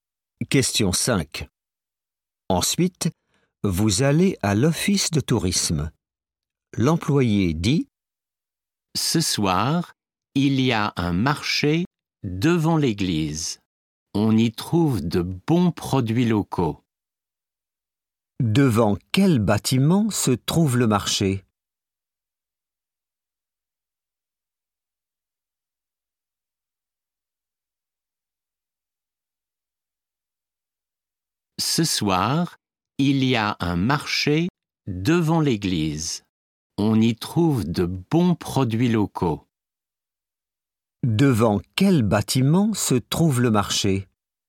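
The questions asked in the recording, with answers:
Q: Devant quel bâtiment se trouve le marché ?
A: l'église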